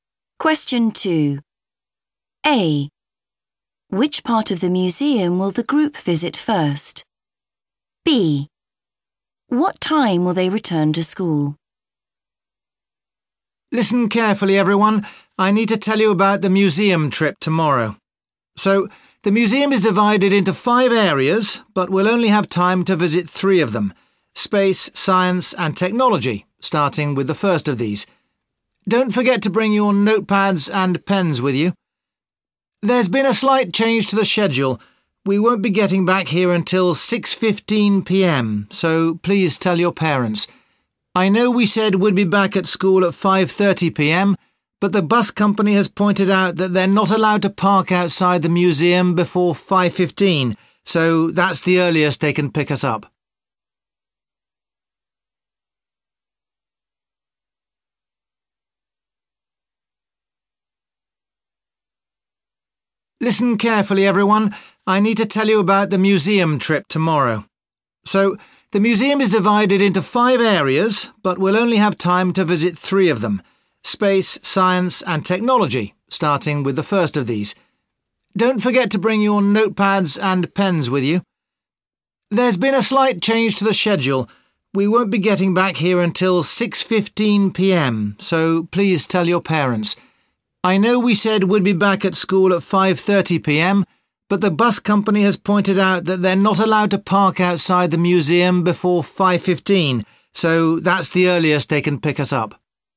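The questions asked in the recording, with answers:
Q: Which part of the museum will the group visit first?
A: space

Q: What time will they return to school?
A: 6:15 p.m.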